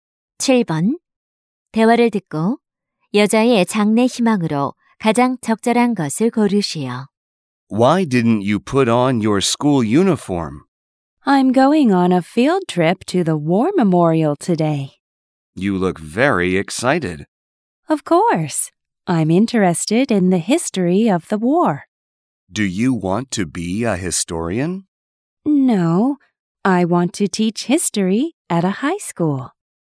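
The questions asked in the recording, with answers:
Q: 대화를 듣고 여자의 장래 희망으로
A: 고등학교 역사 교사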